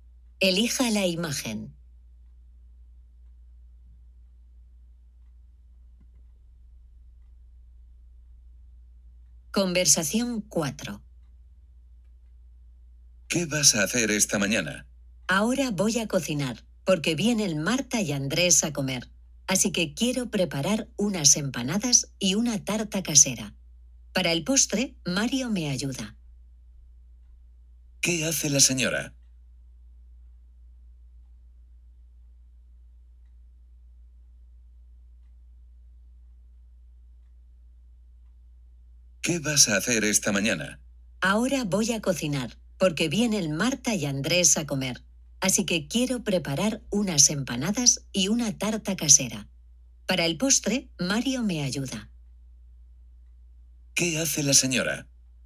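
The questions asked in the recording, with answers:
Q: ¿Qué hace la señora?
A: Cocina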